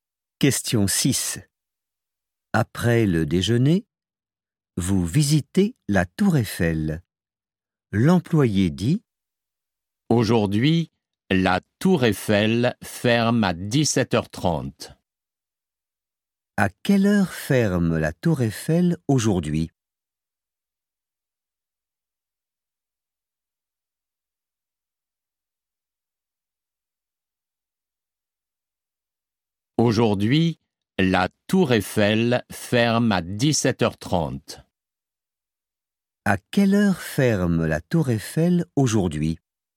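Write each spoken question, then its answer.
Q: À quelle heure ferme la Tour Eiffel aujourd'hui?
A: À 17h30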